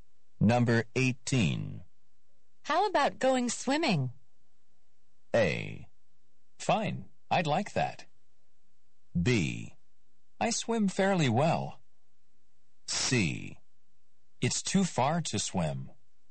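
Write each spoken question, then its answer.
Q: How about going swimming?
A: A: Fine, I'd like that.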